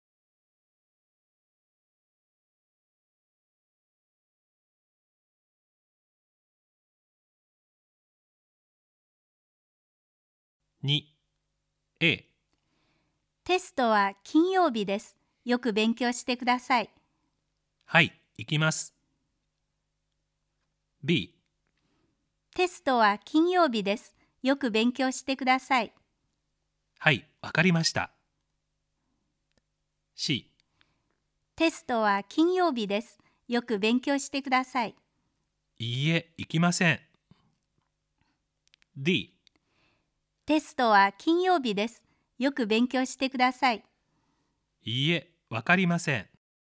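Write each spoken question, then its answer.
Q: テストは金曜日です。よく勉強してください。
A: B: はい、わかりました。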